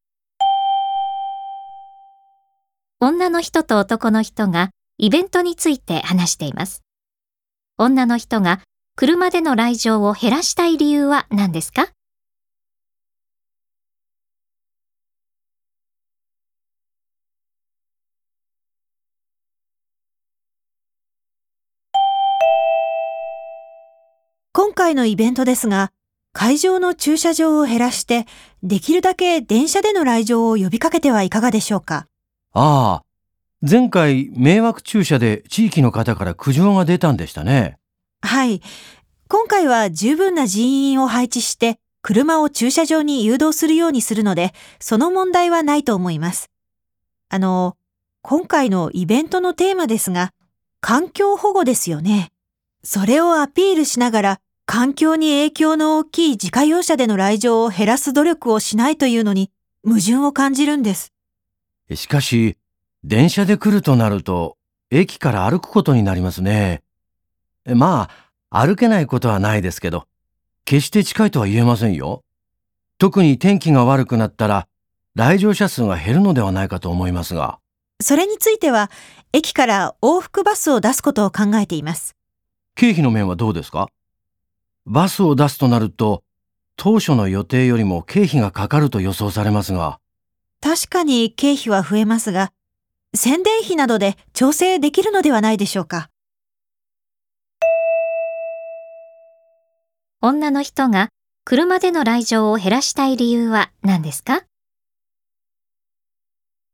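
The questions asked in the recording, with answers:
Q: 女の人が車での来場を減らしたい理由は何ですか?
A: 環境保護がテーマのイベントなのに、自家用車での来場を減らさないのは矛盾するから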